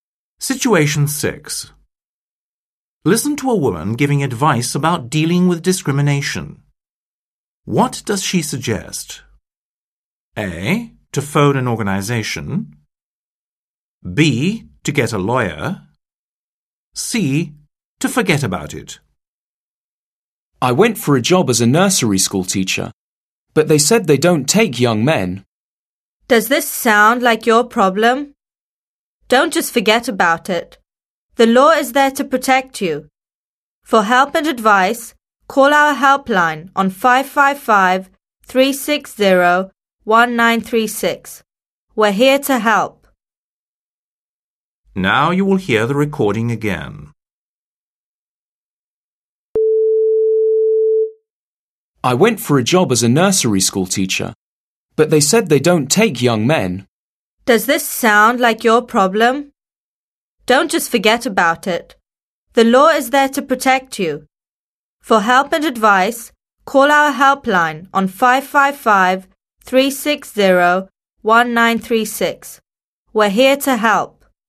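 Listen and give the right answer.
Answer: A: To phone an organization.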